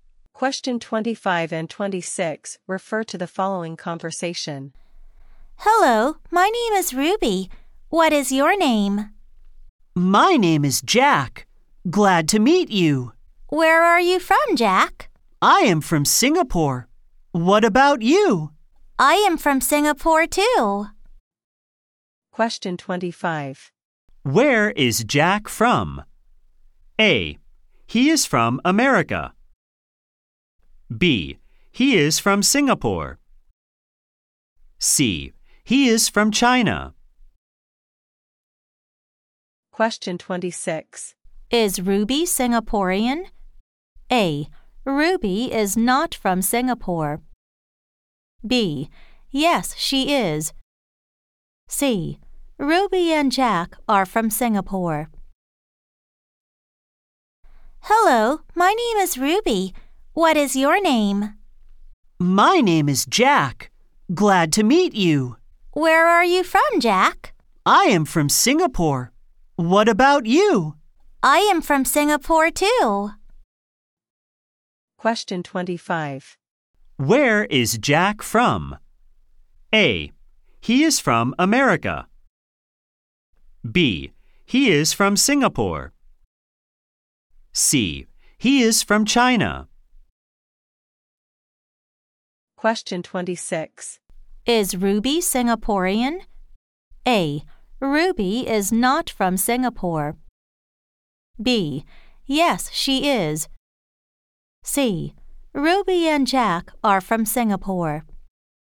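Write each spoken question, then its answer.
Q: Where is Jack from?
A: B: He is from Singapore.

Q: Is Ruby Singaporean?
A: B: Yes, she is.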